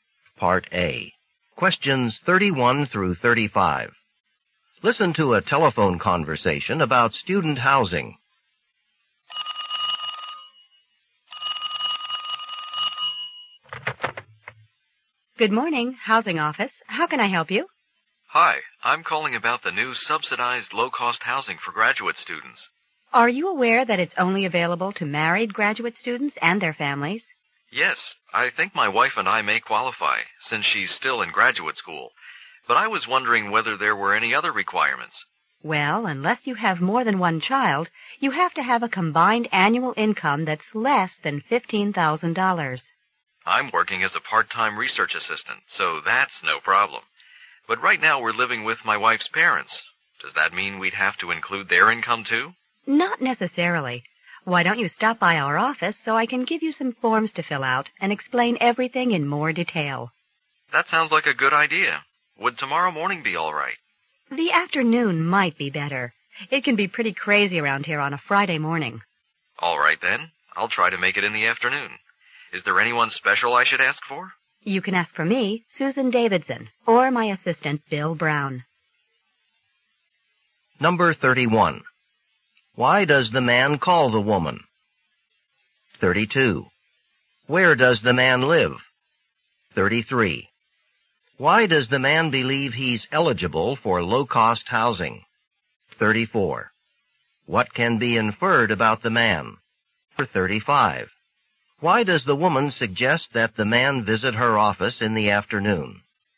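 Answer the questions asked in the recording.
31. To ask about low-cost housing for married graduate students
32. With his wife's parents
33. His wife is a graduate student and their income is low
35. The office is very busy on Friday mornings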